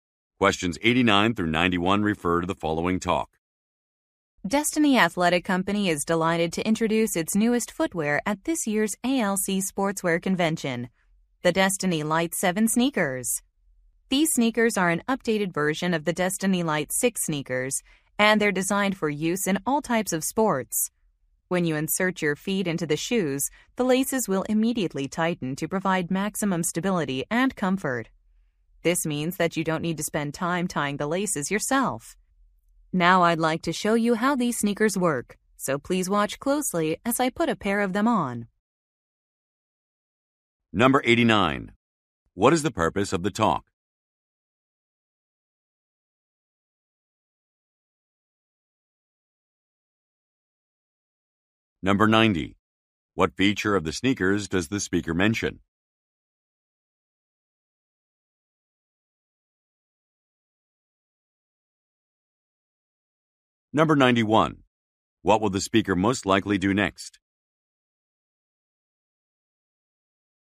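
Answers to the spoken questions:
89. To introduce new sneakers
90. Laces that tighten automatically
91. Demonstrate the sneakers by putting a pair on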